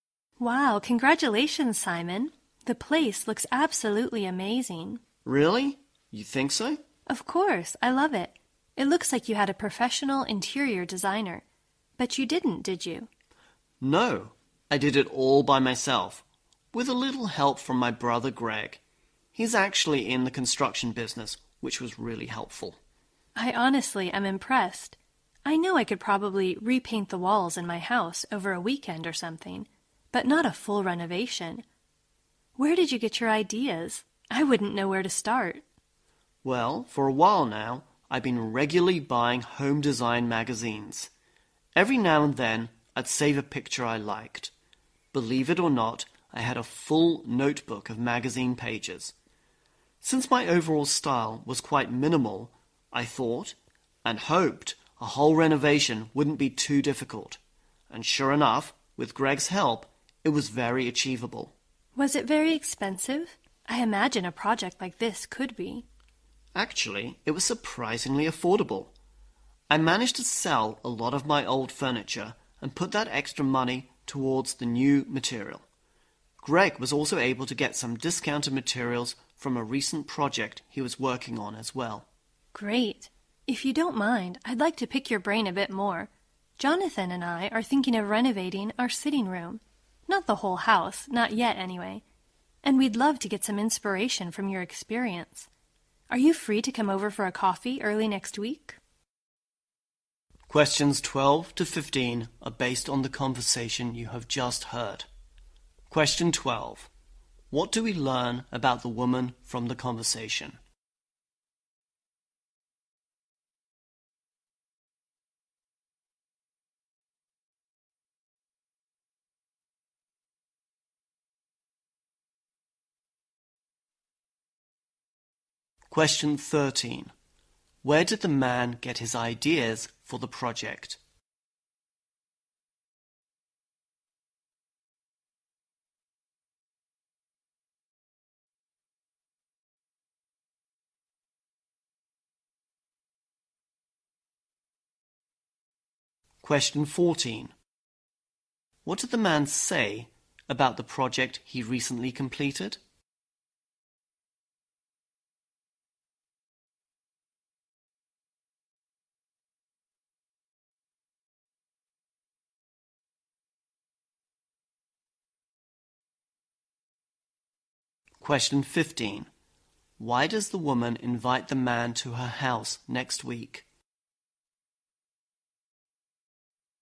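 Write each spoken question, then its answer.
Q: Where did the man get his ideas for the project?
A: From home design magazines.

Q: Why does the woman invite the man to her house next week?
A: To get ideas from his experience for renovating her sitting room.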